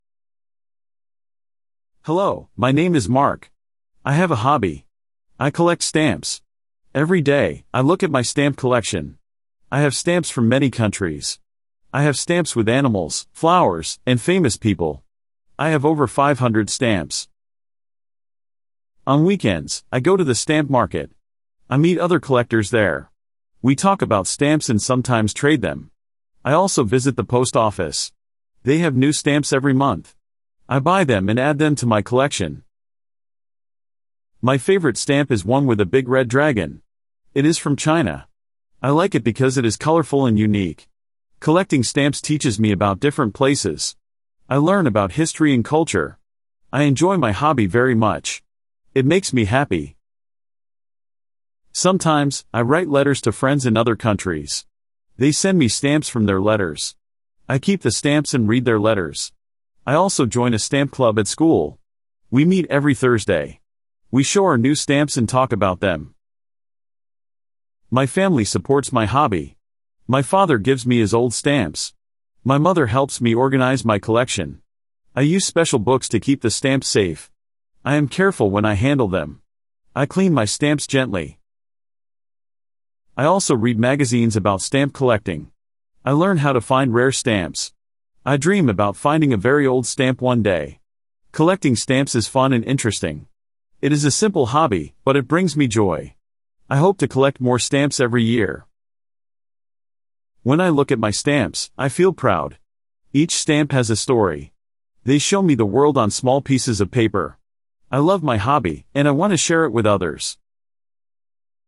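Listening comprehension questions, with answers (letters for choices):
Listen to the mp3 file and match the halves by writing the correct number on the right that goes with the phrase on the left. Then, listen again to check.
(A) every Thursday at school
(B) has new stamps each month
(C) organise his stamp collection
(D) from many different countries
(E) teach him about history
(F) in special books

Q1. Mark collects stamps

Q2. The post office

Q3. The stamp club meets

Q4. His mother helps him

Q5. He keeps his stamps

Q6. The stamps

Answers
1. D
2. B
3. A
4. C
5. F
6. E

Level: Beginner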